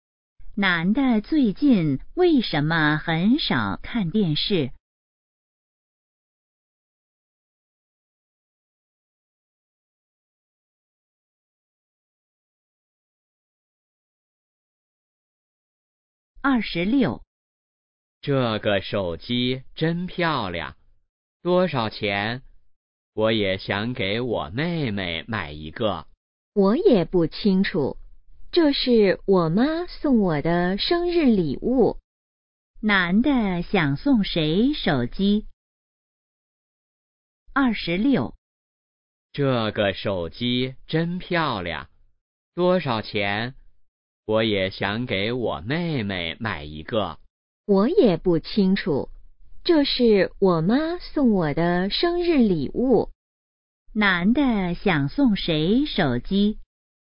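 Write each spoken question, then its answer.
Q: 男的想送谁手机?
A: 妹妹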